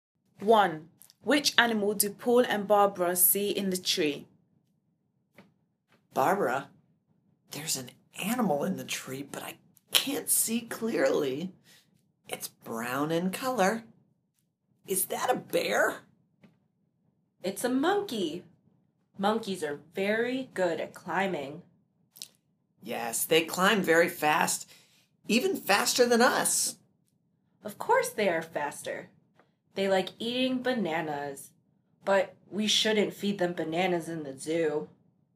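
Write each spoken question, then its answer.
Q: Which animal do Paul and Barbara see in the tree?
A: A monkey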